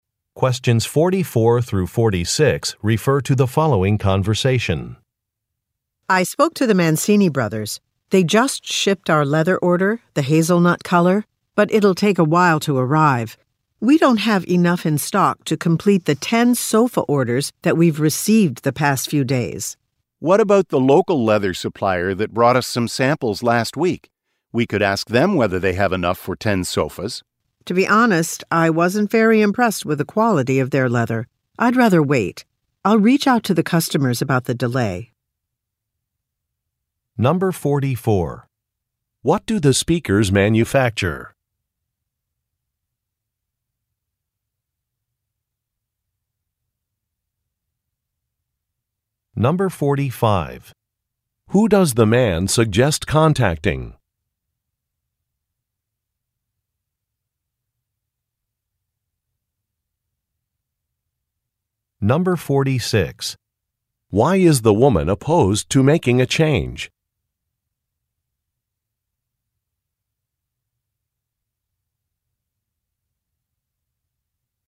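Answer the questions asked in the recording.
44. Sofas (furniture)
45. A local leather supplier
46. She was not impressed with the quality of the local supplier's leather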